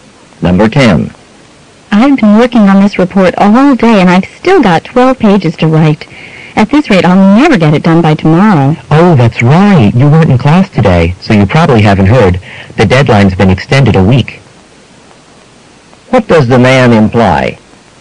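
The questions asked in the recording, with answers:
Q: What does the man imply?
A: The report isn't due tomorrow; there's another week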